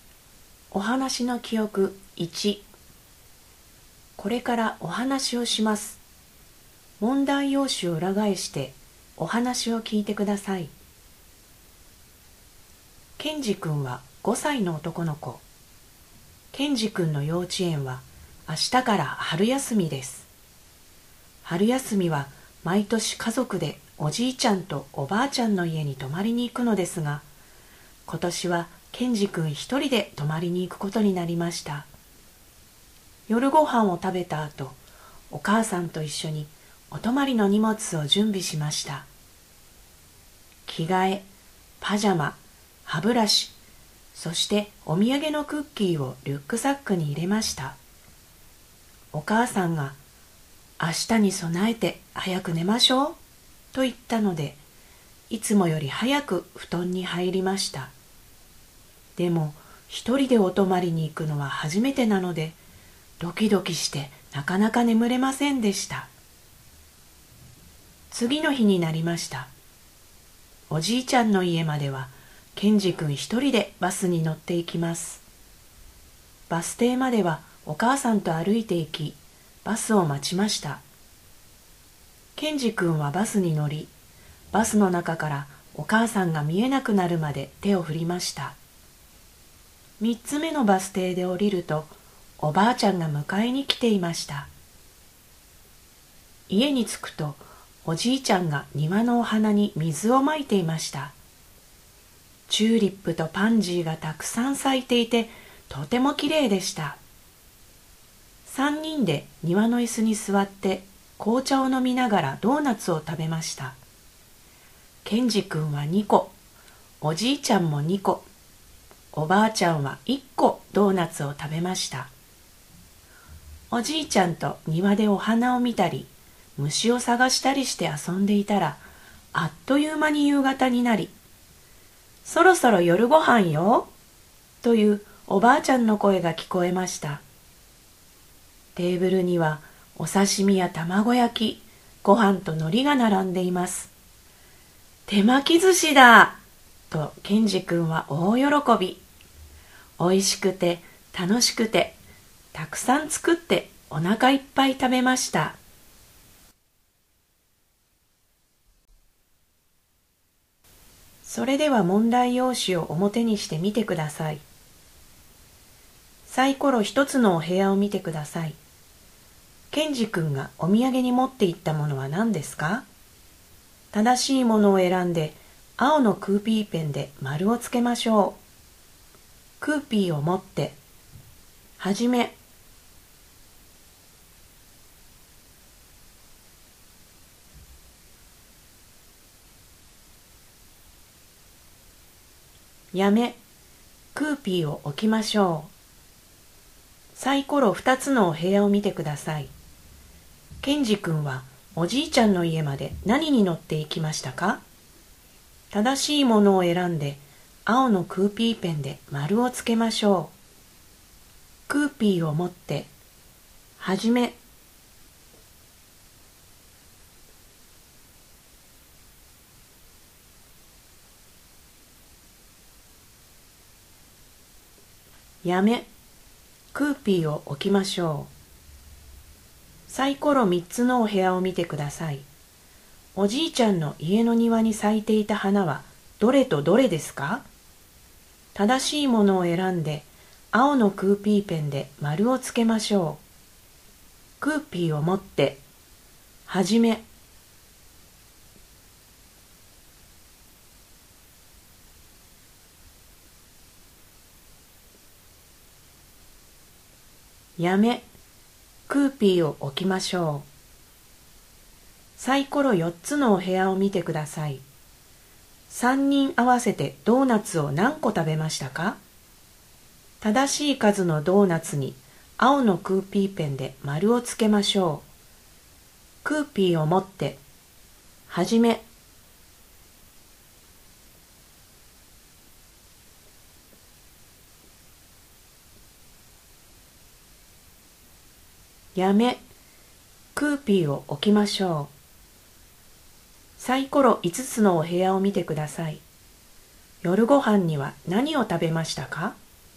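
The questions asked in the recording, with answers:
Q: ケンジ君がお土産に持って行ったものは何ですか?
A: クッキー

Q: ケンジ君はおじいちゃんの家まで何に乗って行きましたか?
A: バス

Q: おじいちゃんの家の庭に咲いていた花はどれとどれですか?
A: チューリップとパンジー

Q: 3人合わせてドーナツを何個食べましたか?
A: 5個

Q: 夜ご飯には何を食べましたか?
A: 手巻き寿司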